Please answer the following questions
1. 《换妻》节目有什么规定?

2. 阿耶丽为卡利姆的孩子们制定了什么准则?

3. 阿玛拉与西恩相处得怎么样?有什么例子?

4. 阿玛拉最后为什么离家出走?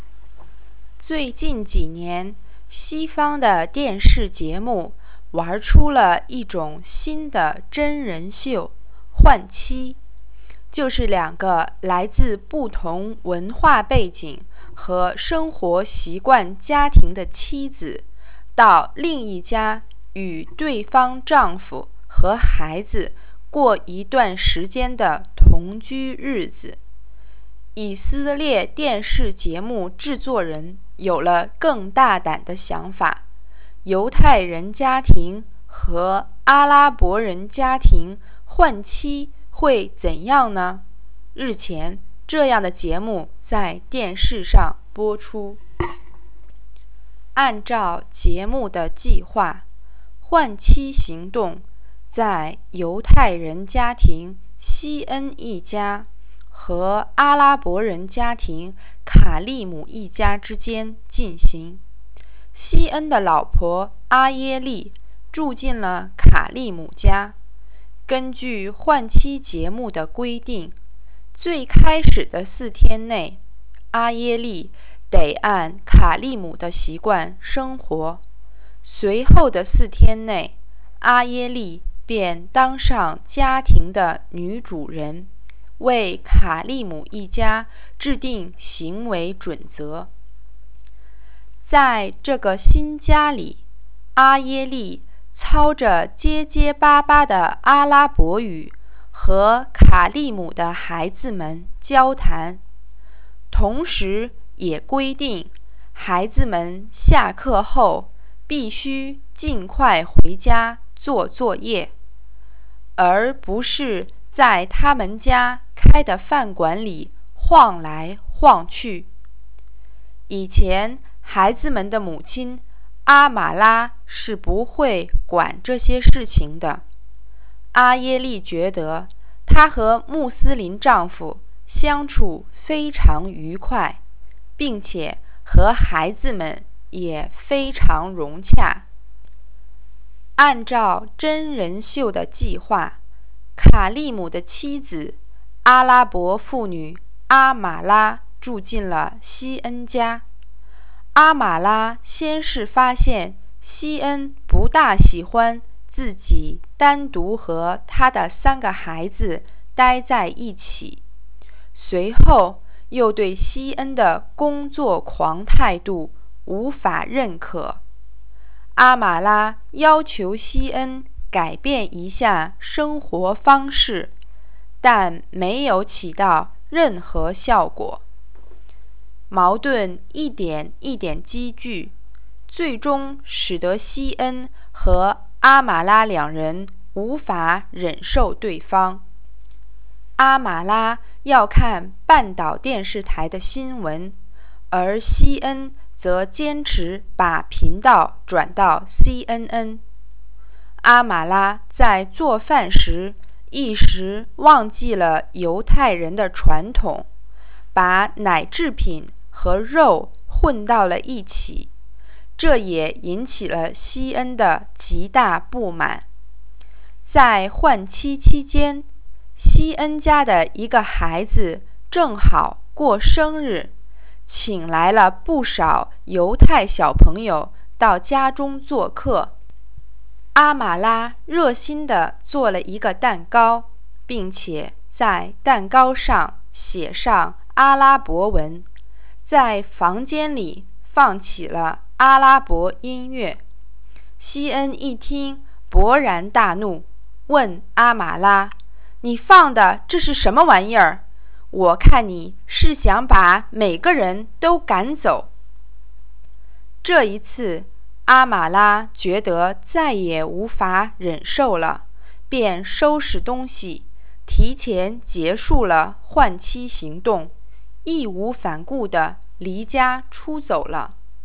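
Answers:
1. 最开始的四天内,妻子得按对方家庭的习惯生活;随后的四天内,她当上家庭的女主人,为这家人制定行为准则。
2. 孩子们下课后必须尽快回家做作业,不能在家里开的饭馆里晃来晃去。
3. 相处得很不好,两人无法忍受对方:西恩不喜欢她单独和孩子们待在一起,她不认可西恩的工作狂态度;她要看半岛电视台,西恩坚持看CNN;她做饭时把奶制品和肉混在一起。
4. 孩子过生日时她做了写着阿拉伯文的蛋糕,还放阿拉伯音乐,西恩勃然大怒,说她想把每个人都赶走,她再也无法忍受。

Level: 3rd Year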